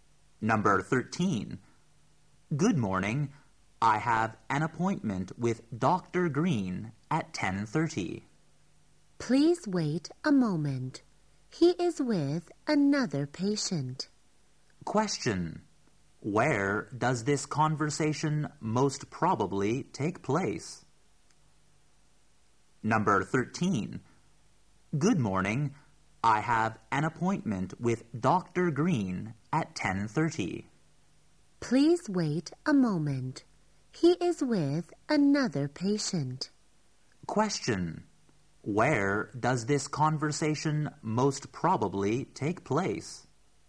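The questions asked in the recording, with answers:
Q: Where does this conversation most probably take place?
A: At a doctor's office or clinic.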